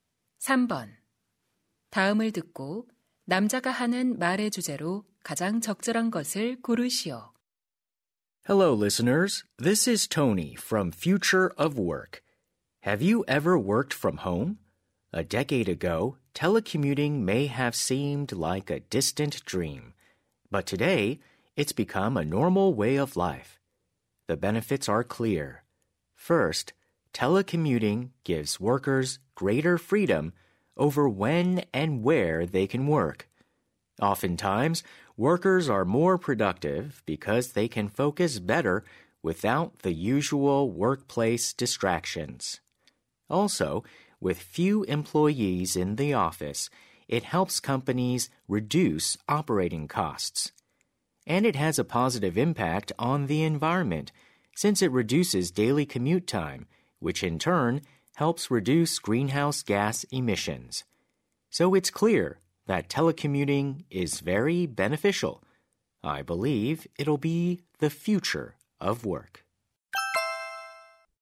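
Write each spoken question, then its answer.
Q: 다음을 듣고 남자가 하는 말의 주제로 가장 적절한 것을 고르시오.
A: 재택근무의 이점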